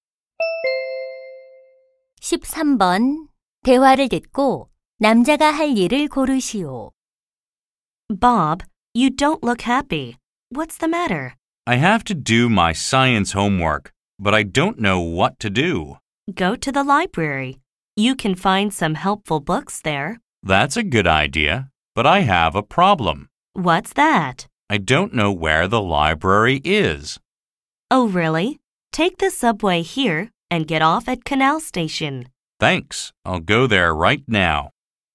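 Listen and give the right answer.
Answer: 도서관에 가기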